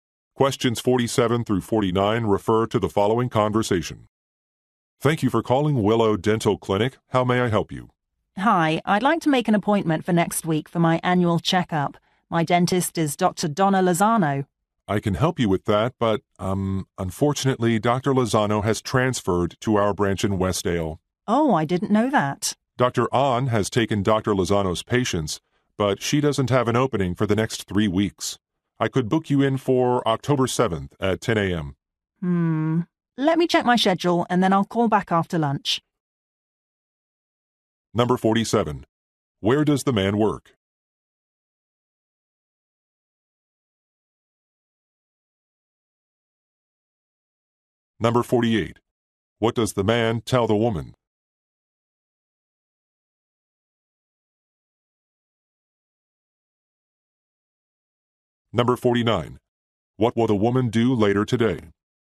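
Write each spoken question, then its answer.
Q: Where does the man work?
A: A dental clinic

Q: What does the man tell the woman?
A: Her dentist transferred to another branch

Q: What will the woman do later today?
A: Call back after checking her schedule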